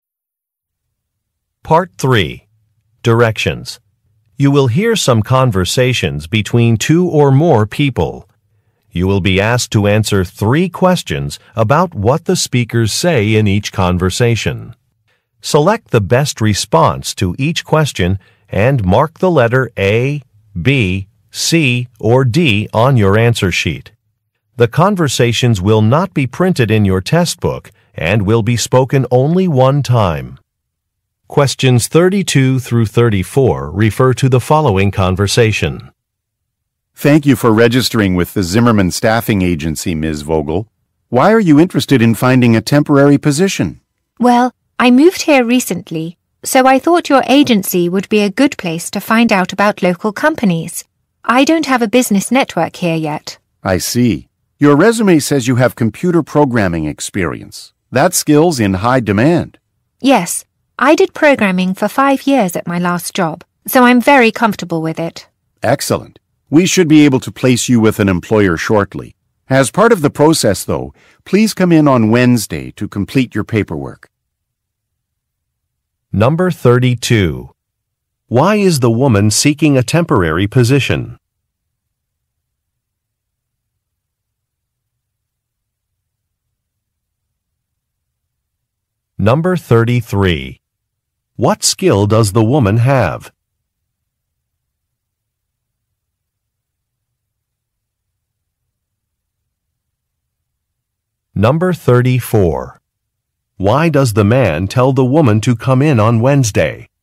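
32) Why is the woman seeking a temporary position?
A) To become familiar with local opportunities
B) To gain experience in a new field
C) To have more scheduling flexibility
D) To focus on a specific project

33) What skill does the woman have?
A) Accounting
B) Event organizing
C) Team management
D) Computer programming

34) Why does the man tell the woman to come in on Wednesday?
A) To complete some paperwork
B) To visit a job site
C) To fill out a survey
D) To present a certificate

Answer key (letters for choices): 32A, 33D, 34A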